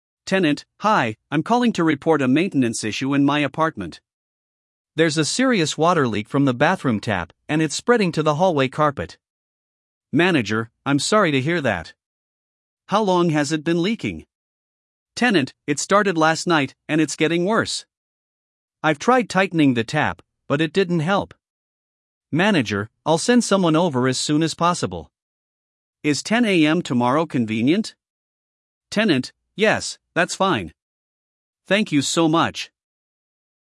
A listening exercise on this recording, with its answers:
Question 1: When did the leak start?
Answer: Last night

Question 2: What time will the repair technician come?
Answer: 10 AM

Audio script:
Tenant: Hi, I'm calling to report a maintenance issue in my apartment. There's a serious water leak from the bathroom tap, and it's spreading to the hallway carpet.
Manager: I'm sorry to hear that. How long has it been leaking?
Tenant: It started last night, and it's getting worse. I've tried tightening the tap, but it didn't help.
Manager: I'll send someone over as soon as possible. Is 10 AM tomorrow convenient?
Tenant: Yes, that's fine. Thank you so much!